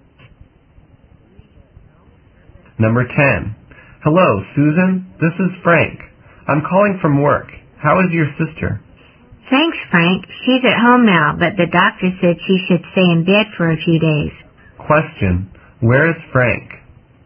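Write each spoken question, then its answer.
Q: Where is Frank?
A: At work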